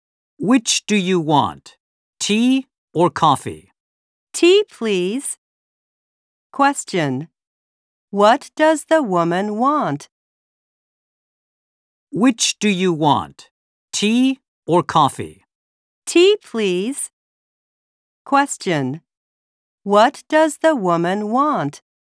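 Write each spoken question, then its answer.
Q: What does the woman want?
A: Tea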